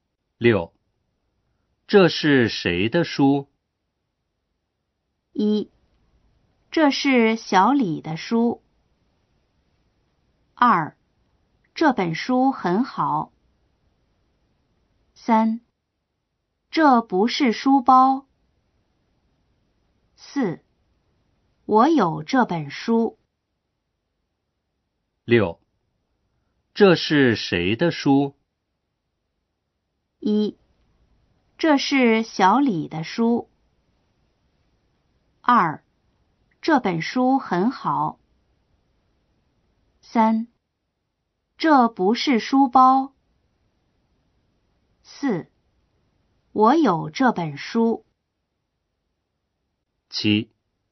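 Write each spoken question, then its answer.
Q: 这是谁的书?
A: 1: 这是小李的书。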